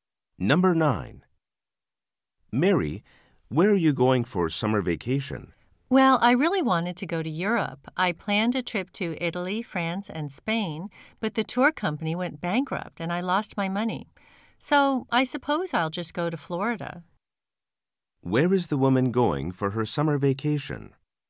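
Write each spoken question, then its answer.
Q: Where is the woman going for her summer vacation?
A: Florida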